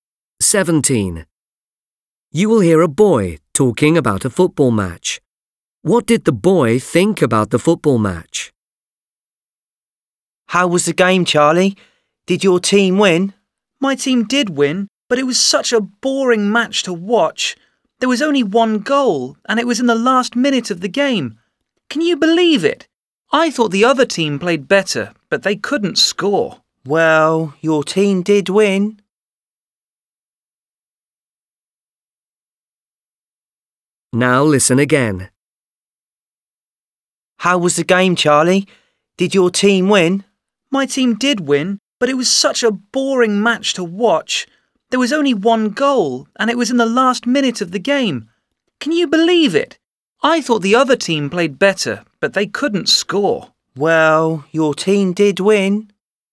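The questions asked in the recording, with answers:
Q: What did the boy think about the football match?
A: it was boring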